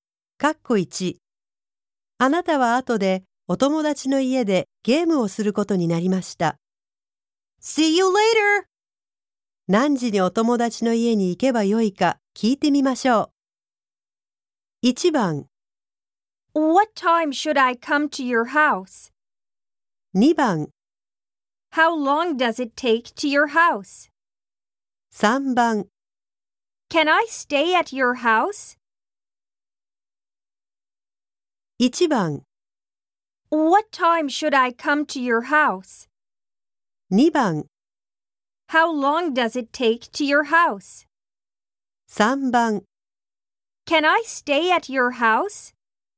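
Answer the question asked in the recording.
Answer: 1: What time should I come to your house?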